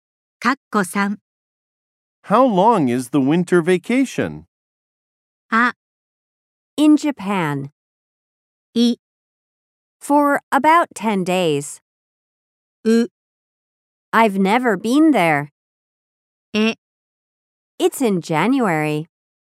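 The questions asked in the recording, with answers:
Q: How long is the winter vacation?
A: い: For about 10 days.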